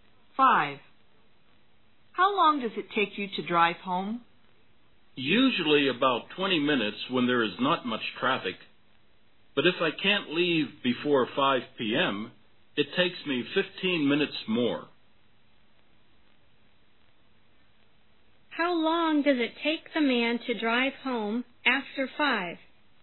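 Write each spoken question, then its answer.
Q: How long does it take the man to drive home after 5?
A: About 35 minutes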